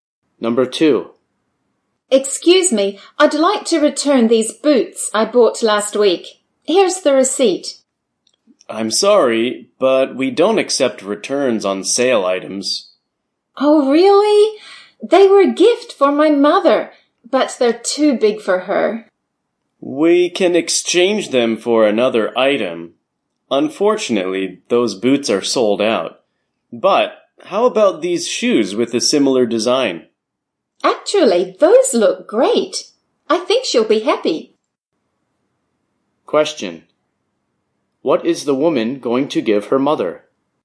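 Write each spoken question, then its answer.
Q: What is the woman going to give her mother?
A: Shoes with a similar design to the boots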